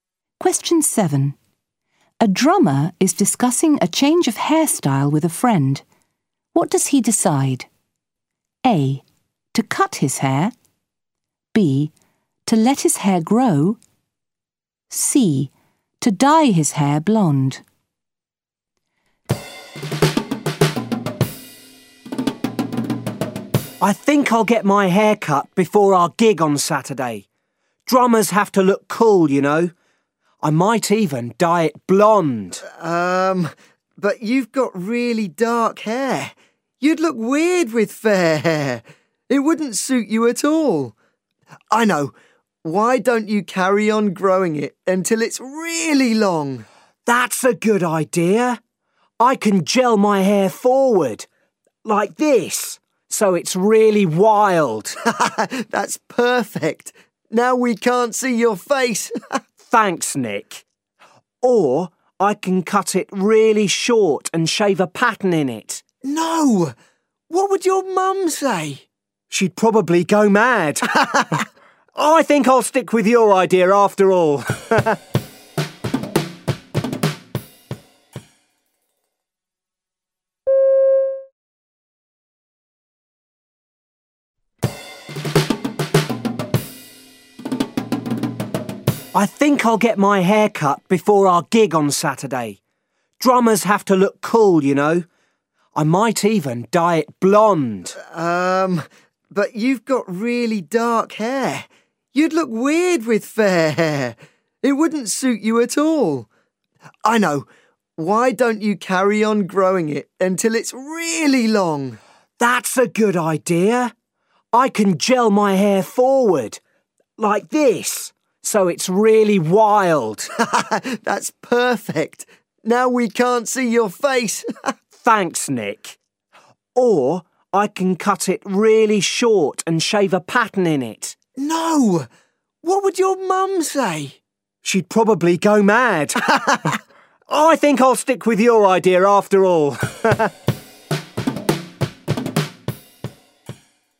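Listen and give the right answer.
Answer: B: To let his hair grow.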